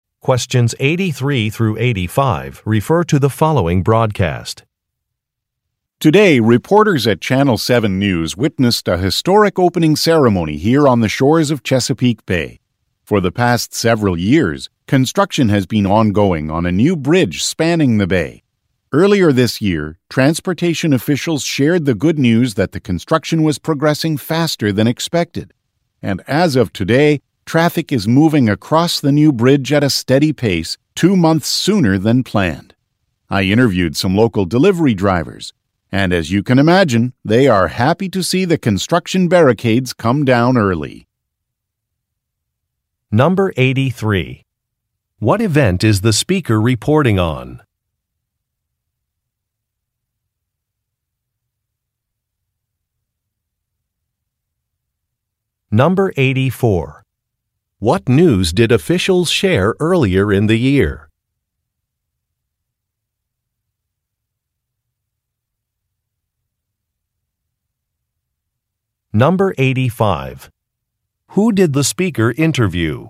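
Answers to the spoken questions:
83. The opening of a new bridge
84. Construction was progressing faster than expected
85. Local delivery drivers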